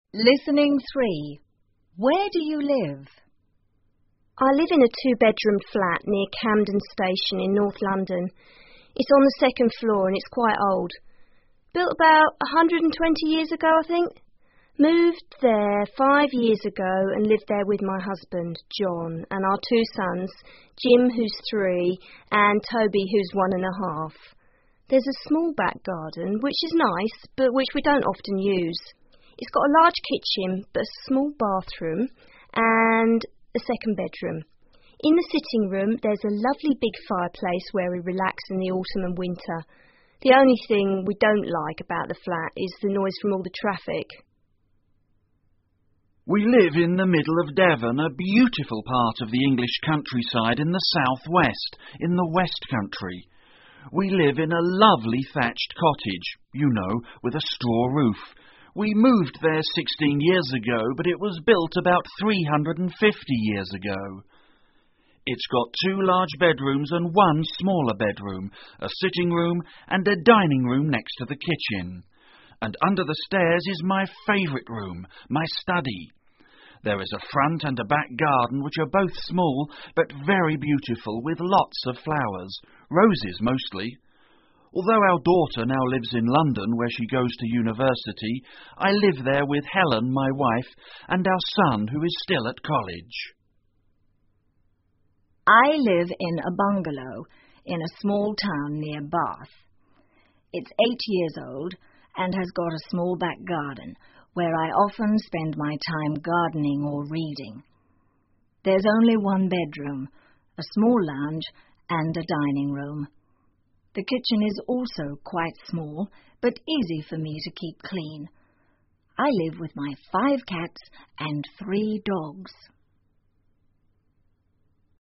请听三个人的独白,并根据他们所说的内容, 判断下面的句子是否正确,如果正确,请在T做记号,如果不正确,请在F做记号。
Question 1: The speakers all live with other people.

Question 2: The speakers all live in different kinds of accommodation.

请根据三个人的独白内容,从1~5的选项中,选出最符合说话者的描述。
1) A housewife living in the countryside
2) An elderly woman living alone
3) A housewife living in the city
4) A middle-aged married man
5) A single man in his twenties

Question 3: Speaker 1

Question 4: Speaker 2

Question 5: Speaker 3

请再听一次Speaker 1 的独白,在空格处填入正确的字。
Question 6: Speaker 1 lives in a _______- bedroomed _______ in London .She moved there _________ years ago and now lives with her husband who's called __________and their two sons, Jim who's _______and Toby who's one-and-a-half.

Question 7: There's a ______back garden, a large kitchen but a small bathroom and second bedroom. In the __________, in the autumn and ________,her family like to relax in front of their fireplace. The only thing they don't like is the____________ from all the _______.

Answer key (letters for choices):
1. F
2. T
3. 3
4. 4
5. 2
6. Flat, five, John, three
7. small, sitting room, winter, noise, traffic

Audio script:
Speak 1 :( Housewife in her thirties) I live in a two-bed roomed flat near Camden Station in North London. It's on the second floor and is quite old. Built about 120 years ago, I think. Moved there five years ago and live there with my husband, John and our two sons, Jim who's three and Toby who's one-and-a-half. There's a small back garden which is nice but which we don't often use. It's got a large kitchen but a small bathroom and the second bedroom. In the sitting room, there's a lovely big fireplace where we relax in the autumn and winter. The only thing we don't like about the flat is the noise from all the traffic.
Speaker 2 :( 55-year-old man) We live in the middle of Devon, a beautiful part of the English countryside in the South-West, in the West Country. We live in a lovely thatched cottage....you know....with a straw roof. We moved there 16 years ago, but it was built about 350 years ago. It's got two large bedrooms and one similar bedroom, a sitting room and a dining room next to the kitchen. And under the stairs is my favorite room, my study. There is a front and a back garden which are both small but very beautiful with lots of flowers; roses mostly. Although our daughter now lives in London where she goes to university, I live there with Helen, my wife, and our son who is still at college.
Speaker 3 :( Elderly woman) I live in a bungalow in a small town near Bath. It's eight years old and has got a small back garden where I often spend my time gardening or reading. There's only one bedroom, a small lounge and a dining room. The kitchen is also quite small, but easy for me to keep clean. I live with my five cats and three dogs.